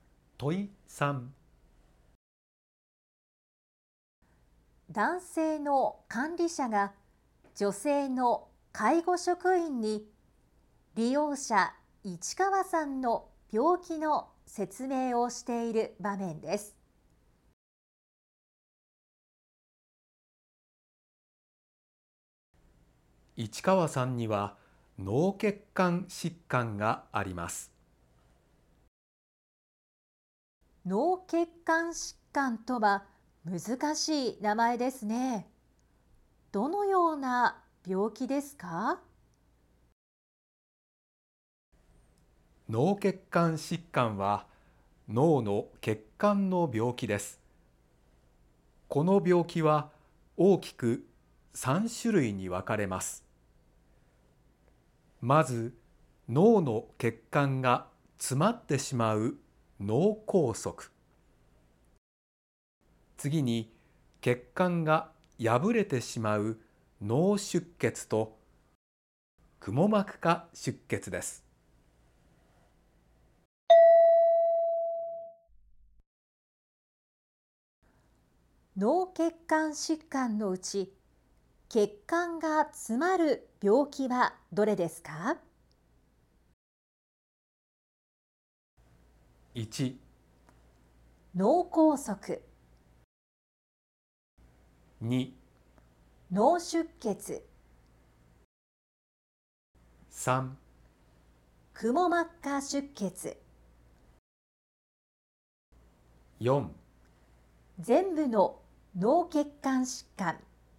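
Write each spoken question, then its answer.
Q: 脳血管疾患のうち、血管が詰まる病気はどれですか?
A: 1: 脳梗塞。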